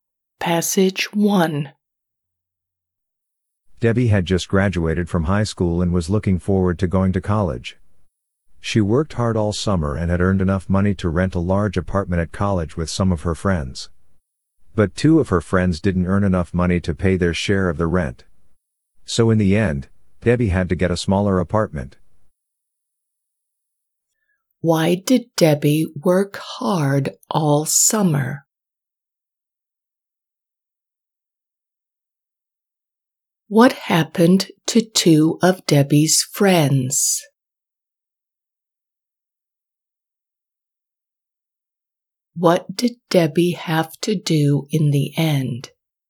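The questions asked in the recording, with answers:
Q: Why did Debbie work hard all summer?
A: to earn money to rent an apartment at college

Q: What happened to two of Debbie's friends?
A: they didn't earn enough money for their share of the rent

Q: What did Debbie have to do in the end?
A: get a smaller apartment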